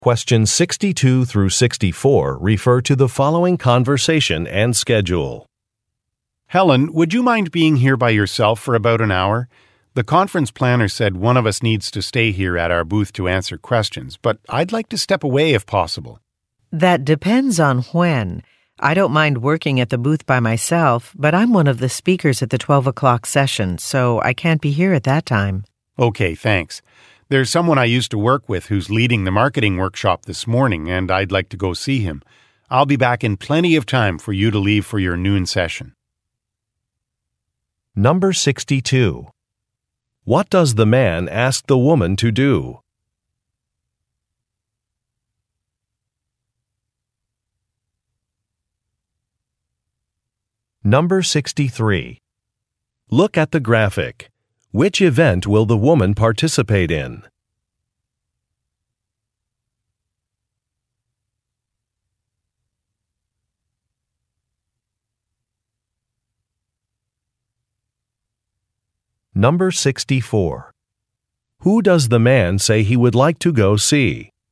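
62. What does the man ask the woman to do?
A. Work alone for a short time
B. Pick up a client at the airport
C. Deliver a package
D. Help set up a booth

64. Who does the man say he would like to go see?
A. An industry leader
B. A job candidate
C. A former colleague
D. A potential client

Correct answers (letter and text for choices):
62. A. Work alone for a short time
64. C. A former colleague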